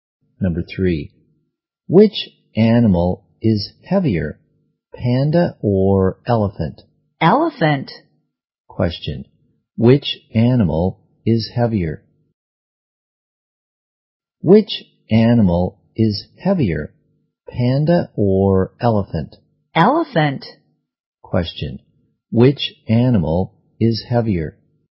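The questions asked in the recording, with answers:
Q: which animal is heavier?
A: The elephant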